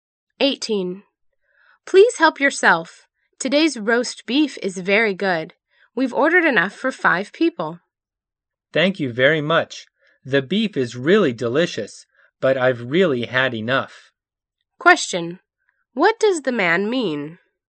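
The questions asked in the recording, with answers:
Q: What does the man mean?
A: He is full and can't eat any more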